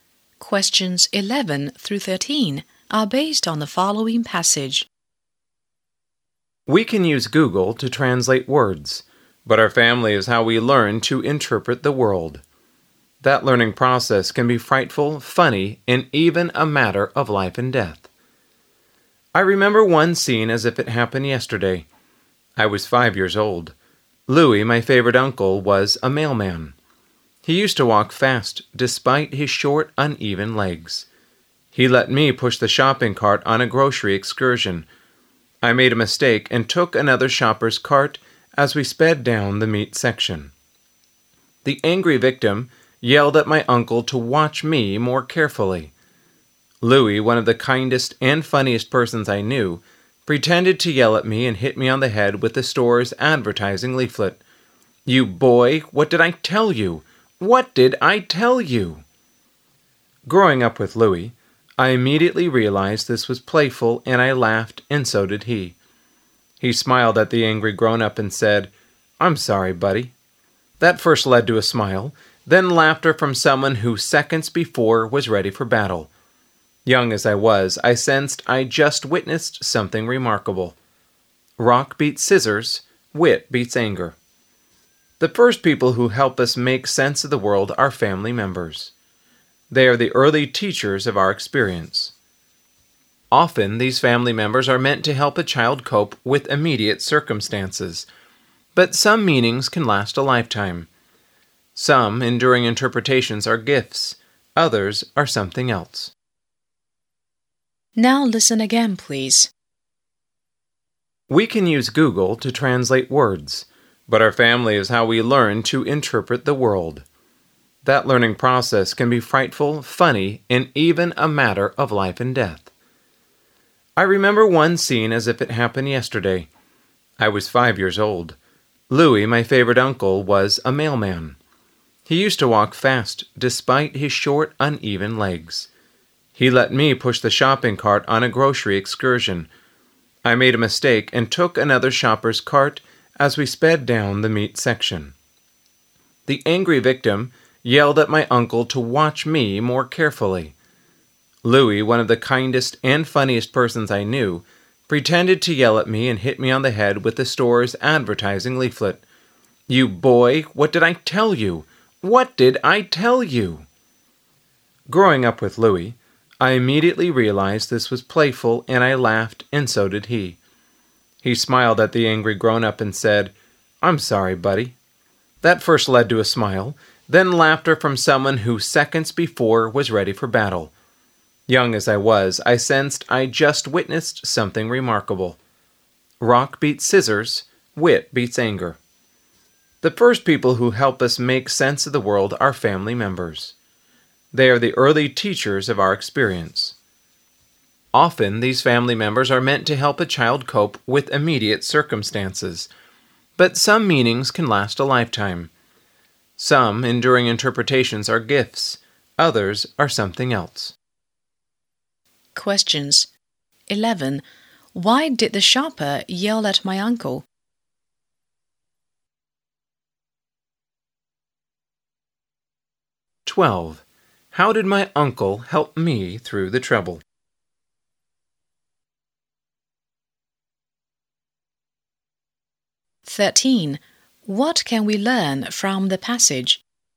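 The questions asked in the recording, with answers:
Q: Why did the shopper yell at my uncle?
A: Because I took the shopper's cart by mistake

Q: How did my uncle help me through the trouble?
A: He used humor, pretending to scold me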